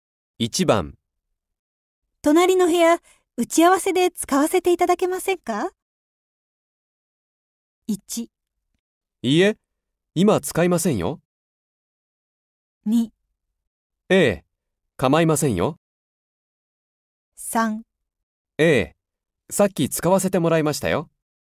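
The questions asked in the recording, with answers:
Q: 隣の部屋、打ち合わせで使わせていただけませんか?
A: 2: ええ、構いませんよ。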